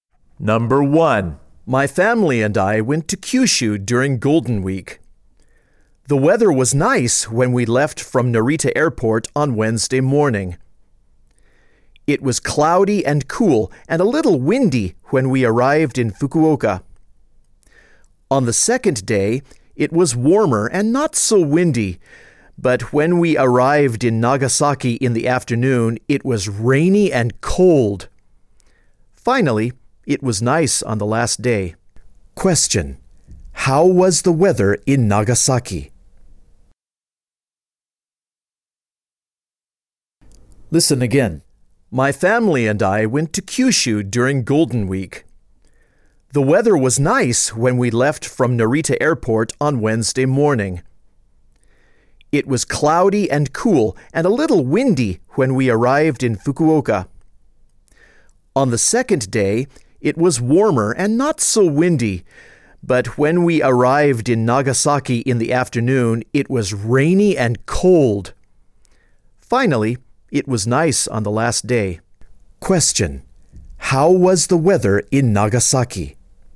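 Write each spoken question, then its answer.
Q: How was the weather in Nagasaki?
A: Rainy and cold.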